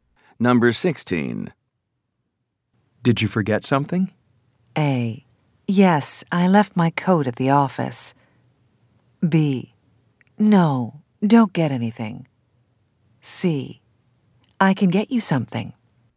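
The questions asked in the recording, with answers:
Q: Did you forget something?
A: A: Yes, I left my coat at the office.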